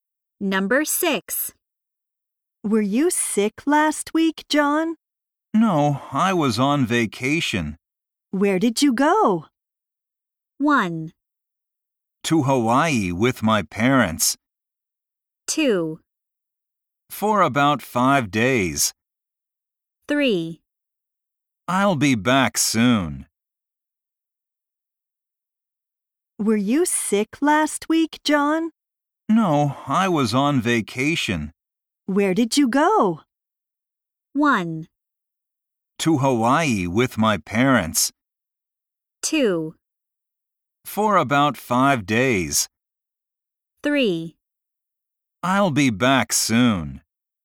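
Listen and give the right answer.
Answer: 1: To Hawaii with my parents.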